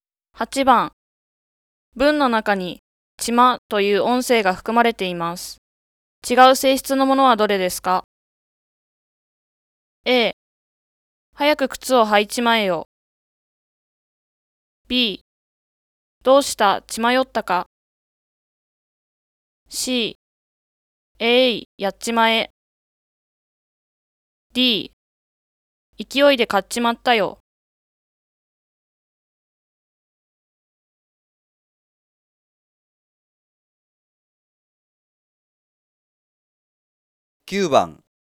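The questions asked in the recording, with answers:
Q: 文の中にちまという音声が含まれています。違う性質のものはどれですか?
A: B: どうした?血迷ったか?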